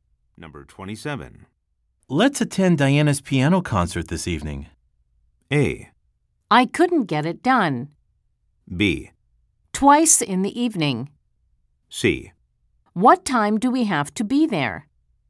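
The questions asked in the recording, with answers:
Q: Let's attend Diana's piano concert this evening.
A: C: What time do we have to be there?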